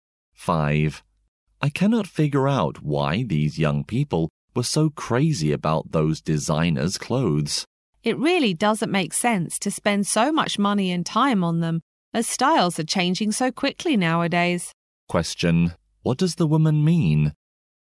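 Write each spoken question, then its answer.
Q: What does the woman mean?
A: Spending much on designer clothes is not worth it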